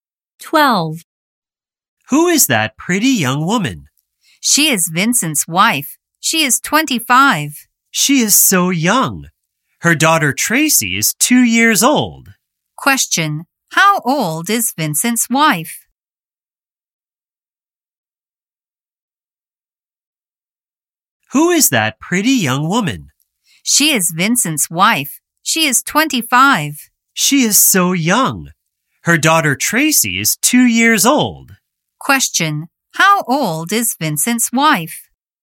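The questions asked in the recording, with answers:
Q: Question. How old is Vincent's wife?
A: 25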